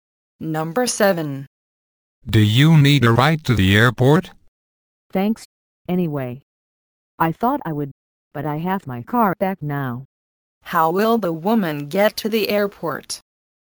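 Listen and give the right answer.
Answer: She will drive her own car.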